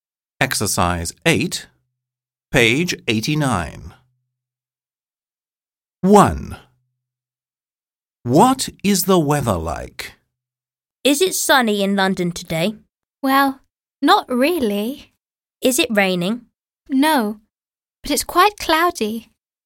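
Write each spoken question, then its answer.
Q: What is the weather like?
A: Cloudy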